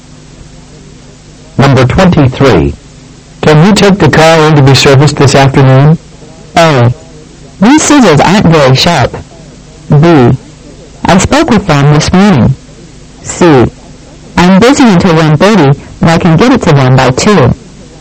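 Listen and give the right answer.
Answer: C: I'm busy until 1:30, but I can get it to them by 2.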